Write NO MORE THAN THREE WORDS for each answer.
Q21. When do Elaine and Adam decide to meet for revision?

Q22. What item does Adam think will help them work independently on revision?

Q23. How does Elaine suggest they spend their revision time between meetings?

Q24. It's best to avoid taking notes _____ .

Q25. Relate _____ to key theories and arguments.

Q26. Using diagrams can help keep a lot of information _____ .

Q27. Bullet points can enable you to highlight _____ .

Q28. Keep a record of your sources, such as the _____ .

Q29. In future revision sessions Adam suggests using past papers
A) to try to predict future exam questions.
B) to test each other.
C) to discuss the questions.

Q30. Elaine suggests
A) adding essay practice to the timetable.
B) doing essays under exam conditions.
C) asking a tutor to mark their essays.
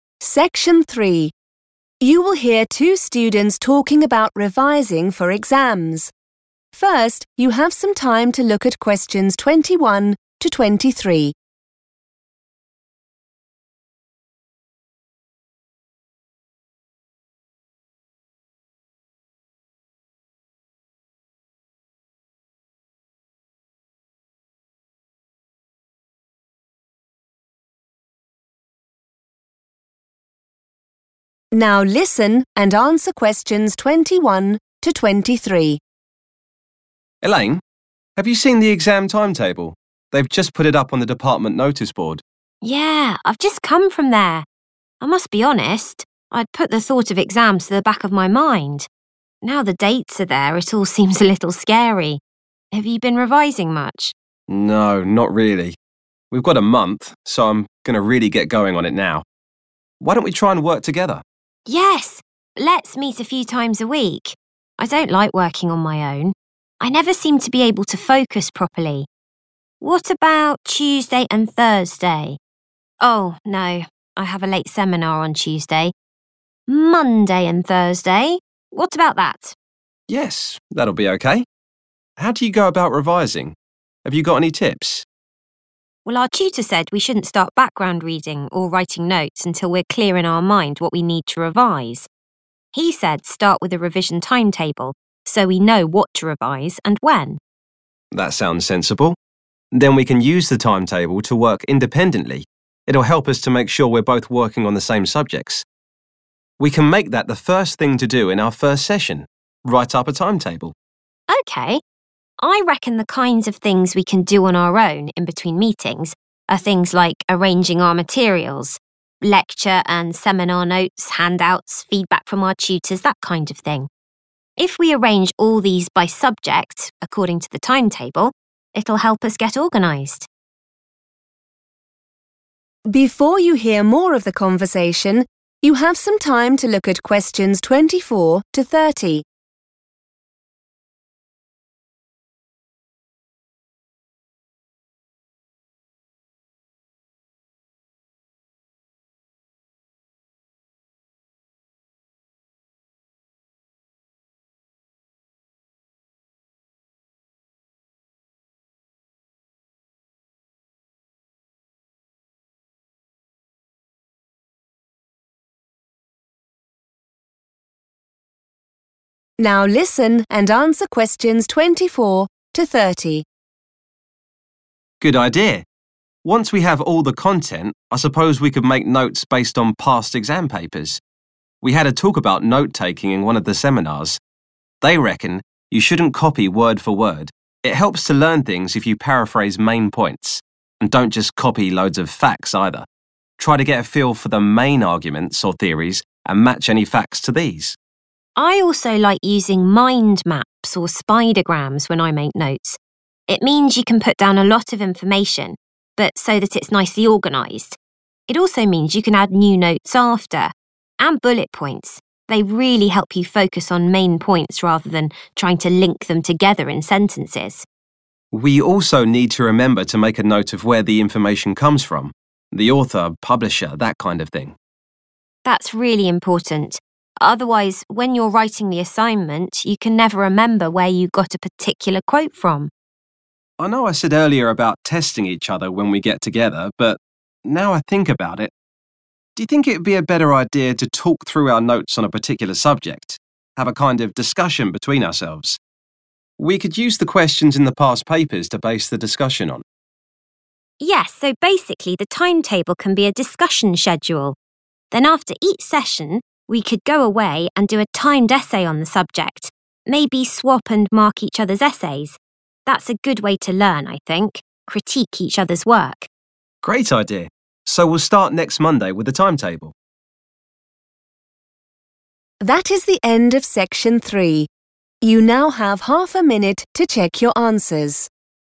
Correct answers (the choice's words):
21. Monday and Thursday
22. a revision timetable / a timetable / the revision timetable / the timetable / revision timetable / timetable
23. arranging their materials / arranging materials
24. word for word
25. facts
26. nicely organised / organised / nicely organized / organized
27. key points / main points
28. author and publisher / author,publisher
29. to discuss the questions.
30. doing essays under exam conditions.

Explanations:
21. The correct answer is Monday and Thursday because these are the days Adam and Elaine agree on to meet and study. At first, Elaine thinks about meeting on Tuesday and Thursday, but then she remembers she has a class (a seminar) that ends late on Tuesday. She suggests Monday and Thursday instead, and Adam agrees to this plan.
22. The correct answer is supported by Adam's response to Elaine's suggestion. After Elaine mentions creating a revision schedule, Adam agrees and specifically mentions that they can use this schedule (the timetable) to study by themselves (work independently) while staying focused on the same topics.
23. The correct answer is correct because Elaine explicitly suggests that they can spend their time alone between their sessions organizing their study resources. She mentions 'arranging our materials' as a task they can handle independently to help them stay focused and 'get organised'. In this context, 'materials' refers to school-related papers like notes and handouts.
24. The correct answer is "word for word" because Adam shares advice from a seminar which says people should not copy notes exactly as they appear. The word "avoid" in the task matches Adam's phrase "shouldn't copy." He says that changing the words, or paraphrasing, is a better way to learn.
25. The correct answer is "facts" because Adam gives advice on how to take good notes. He mentions that students should not just copy long lists of data. Instead, they should understand the big ideas, which are called theories or arguments, and then link or "match" the specific information to those ideas. To match something to an idea is the same as relating it.
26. The correct answer is "(nicely) organised" because Elaine mentions that she likes to use mind maps or spidergrams (which are types of diagrams) when making notes. She explains that these tools allow her to include a lot of information while ensuring it stays systematic and tidy. The word "organised" describes the state of the information when these diagrams are used.
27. The correct answer is 'main points' because Elaine explains how bullet points are useful for note-taking. She mentions that they help you 'focus on'—which is a synonym for 'highlight'—the 'main points' (the key points) instead of spending time trying to connect every idea into full sentences.
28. The correct answer is based on Adam's suggestion for their revision process. He mentions that it is important to record where information comes from, specifically naming the 'author' and 'publisher' as examples of details to keep a record of. This ensures they can cite their sources correctly later.
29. The correct answer is C because Adam proposes that they talk about their notes together instead of just testing each other. He suggests using the questions found in old exam papers (past papers) as the topic for these talks. In the transcript, he uses the word 'discussion' to describe this activity.
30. The correct answer is B because Elaine suggests doing a 'timed essay' after their meetings. A 'timed essay' means writing something within a specific time limit, which is what happens during a real test or under 'exam conditions.' She also mentions marking the essays themselves by swapping them, rather than asking a tutor to do it.

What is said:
Adam: Elaine. Have you seen the exam timetable? They've just put it up on the department noticeboard.
Elaine: Yeah, I've just come from there. I must be honest, I'd put the thought of exams to the back of my mind. Now the dates are there it all seems a little scary. Have you been revising much?
Adam: No, not really. We've got a month so I'm going to really get going on it now. Why don't we try and work together?
Elaine: Yes, let's meet a few times a week. I don't like working on my own; I never seem to be able to focus properly. What about Tuesday and Thursday? Oh no ... I have a late seminar on Tuesday. Monday and Thursday? What about that?
Adam: Yes, that'll be okay. How do you go about revising? Have you got any tips?
Elaine: Well, our tutor said we shouldn't start background reading or writing notes until we're clear in our mind what we need to revise. He said start with a revision timetable so we know what to revise and when.
Adam: That sounds sensible. Then we can use the timetable to work independently ... It'll help us to make sure we're both working on the same subjects ... We can make that the first thing to do in our first session - write up a timetable.
Elaine: Okay. I reckon the kinds of things we can do on our own in between meetings are things like arranging our materials - lecture and seminars notes, handouts, feedback from our tutors, that kind of thing. If we arrange all these by subject, according to the timetable, it will help us get organised.
Adam: Good idea. Once we have all the content I suppose we could make notes based on past exam papers. We had a talk about note taking in one of the seminars. They reckon you shouldn't copy word for word. It helps to learn things if you paraphrase main points. And don't just copy loads of facts either ... try to get a feel for the main arguments or theories and match any facts to these.
Elaine: I also like using mind maps or spidergrams when I make notes. It means you can put down a lot of information but so that it's nicely organised. It also means you can add new notes after. And bullet points ... they really help you focus on main points rather than trying to link them together in sentences.
Adam: We also need to remember to make a note of where the information comes from - the author, publisher that kind of thing.
Elaine: That's really important ... otherwise when you're writing the assignment you can never remember where you got a particular quote from.
Adam: I know I said earlier about testing each other when we get together but, now I think about it, do you think it would be a better idea to talk through our notes on a particular subject, have a kind of discussion between ourselves? We could use the questions in the past papers to base the discussion on.
Elaine: Yes, so basically the timetable can be a discussion schedule. Then after each session we could go away and do a timed essay on the subject ... maybe swap and mark each other's essays. That's a good way to learn, I think; critique each other's work.
Adam: Great idea. So we'll start next Monday with the timetable ...